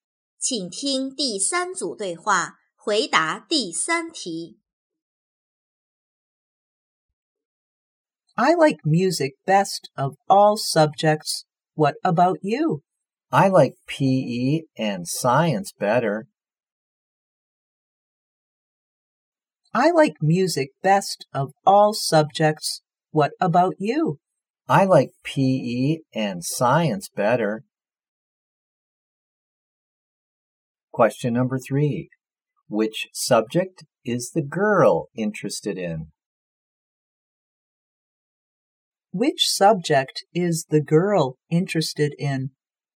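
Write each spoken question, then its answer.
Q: Which subject is the girl interested in?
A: PE and science.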